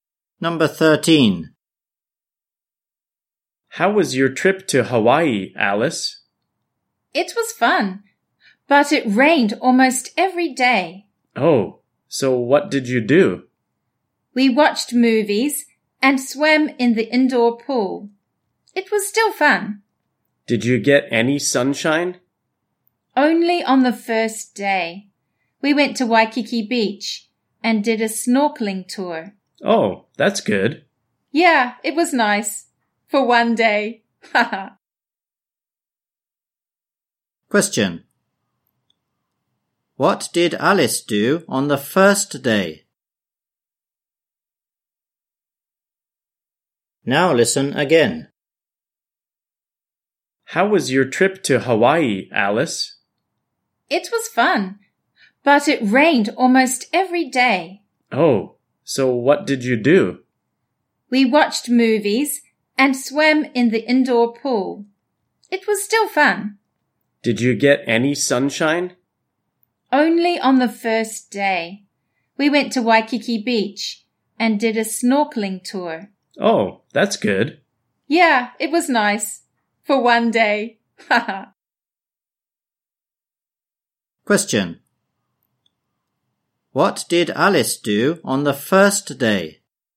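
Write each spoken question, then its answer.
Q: What did Alice do on the first day?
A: She went to Waikiki Beach and did a snorkeling tour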